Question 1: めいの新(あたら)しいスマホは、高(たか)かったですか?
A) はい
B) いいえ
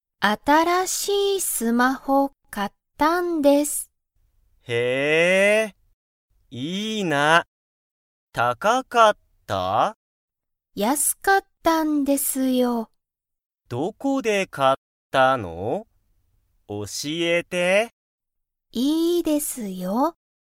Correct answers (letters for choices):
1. B

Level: Level 1